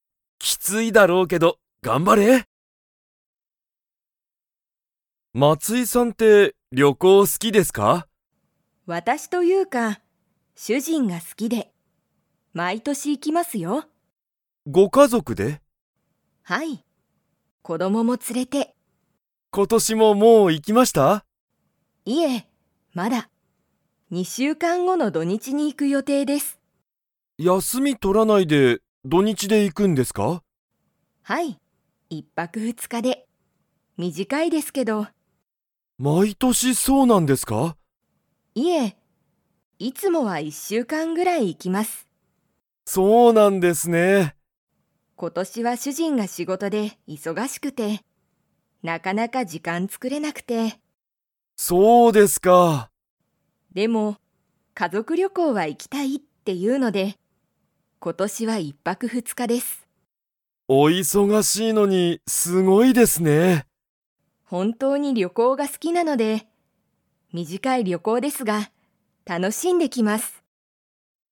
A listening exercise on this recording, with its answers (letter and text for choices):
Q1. 松井(まつい)さんは、今年(ことし)、もう旅行(りょこう)に行(い)きましたか?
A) はい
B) いいえ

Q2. いつもは、松井(まつい)さんは ぐらい旅行(りょこう)に行(い)く。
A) 一泊(いっぱく)二日(ふつか)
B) 土日(どにち)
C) 一週間(いっしゅうかん)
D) 二週間(にしゅうかん)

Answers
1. B) いいえ
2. C) 一週間(いっしゅうかん)

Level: Level 4